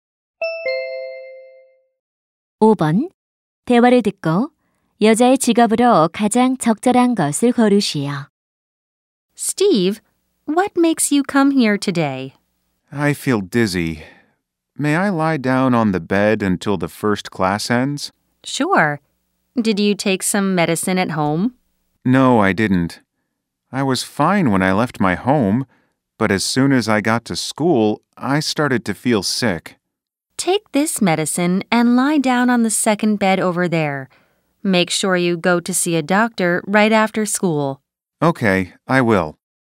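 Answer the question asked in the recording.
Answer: 보건 교사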